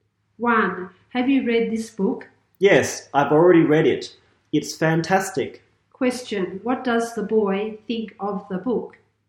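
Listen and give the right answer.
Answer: It's fantastic.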